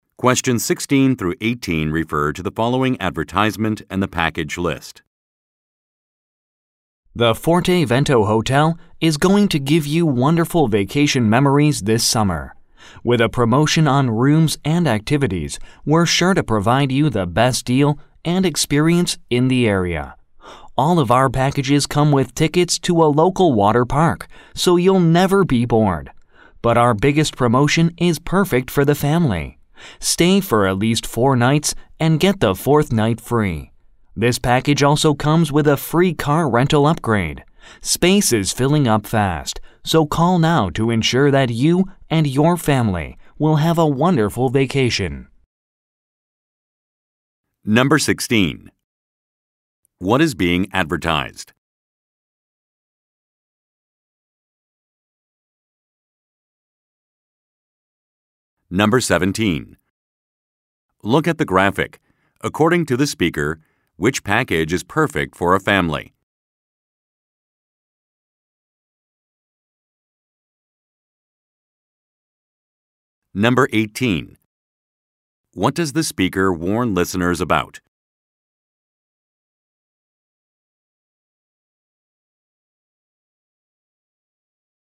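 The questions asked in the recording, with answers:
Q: What is being advertised?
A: Hotel vacation packages at the Forte Vento Hotel

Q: What does the speaker warn listeners about?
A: Space is filling up fast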